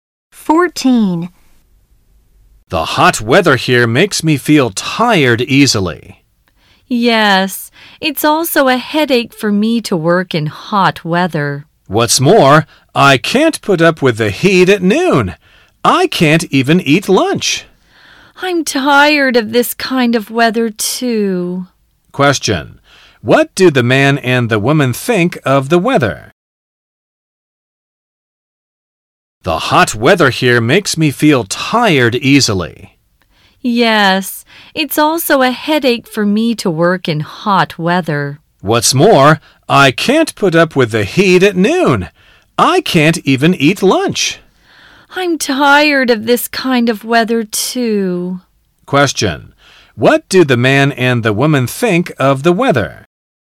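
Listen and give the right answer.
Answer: It is too hot and makes them tired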